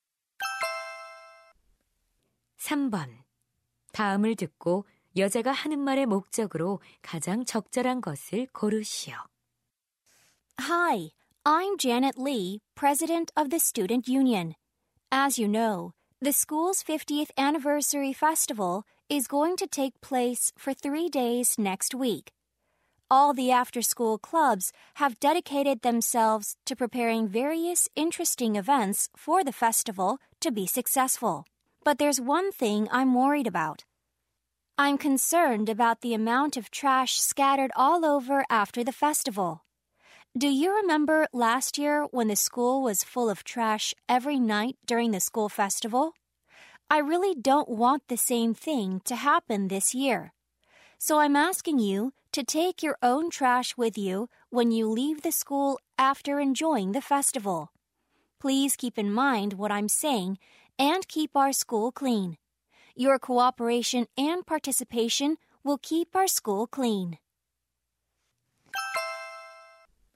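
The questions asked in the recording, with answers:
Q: 다음을 듣고 여자가 하는 말의 목적으로 가장 적절한 것을 고르시오.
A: 축제 후 각자 자기 쓰레기를 가져가 달라고 요청하려고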